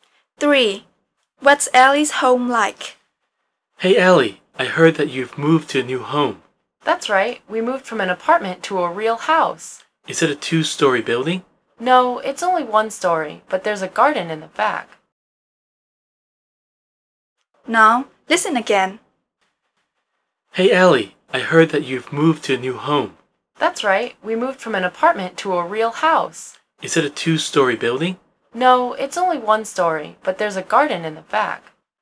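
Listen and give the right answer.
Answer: A one-story house with a garden in the back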